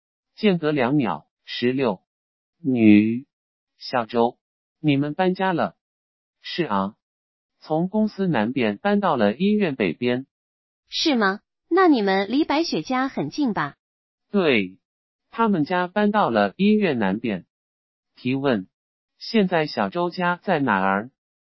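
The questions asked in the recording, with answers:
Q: 提问,现在小周家在哪儿?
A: 医院北边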